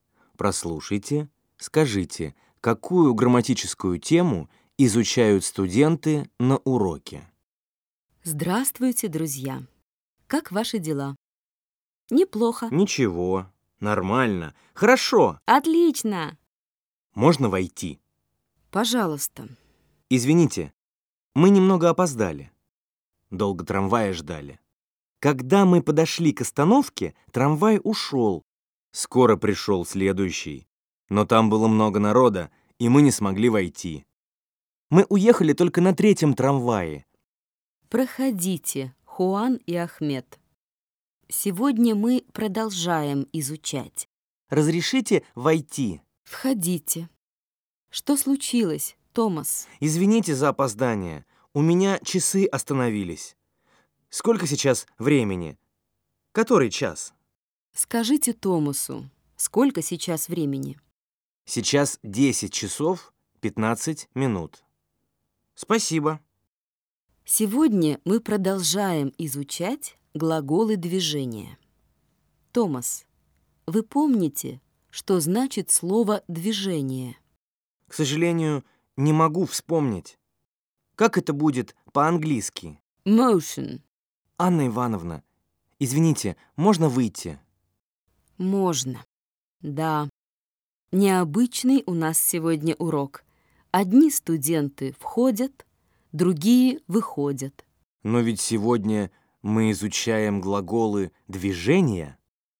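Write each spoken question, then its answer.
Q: Прослушайте, скажите, какую грамматическую тему изучают студенты на уроке?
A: Глаголы движения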